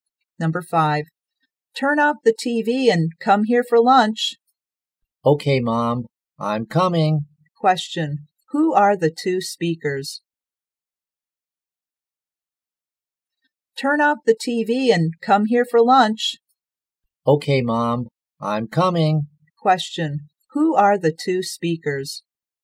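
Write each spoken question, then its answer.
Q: Question, who are the two speakers?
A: Mother and child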